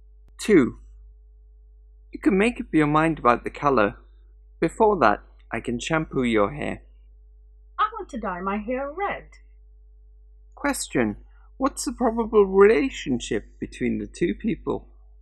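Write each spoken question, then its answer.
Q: what's the probable relationship between the two people?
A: Hairdresser and customer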